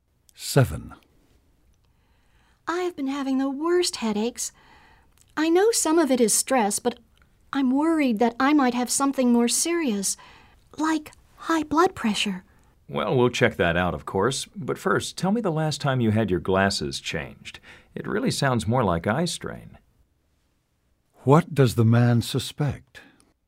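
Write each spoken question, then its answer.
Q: What does the man suspect?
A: Eye strain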